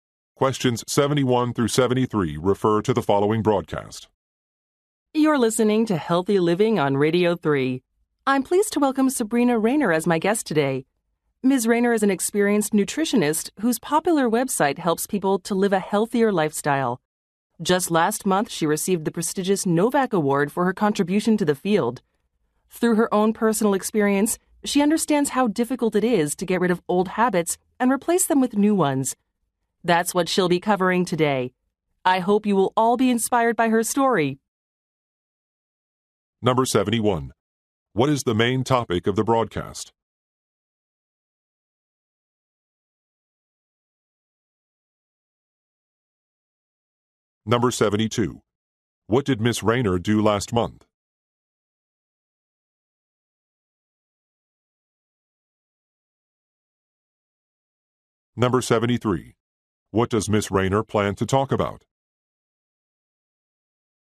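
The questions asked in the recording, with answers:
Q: What is the main topic of the broadcast?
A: Healthy living / nutrition

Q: What did Ms. Rayner do last month?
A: She received the Novak Award

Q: What does Ms. Rayner plan to talk about?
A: Replacing old habits with new ones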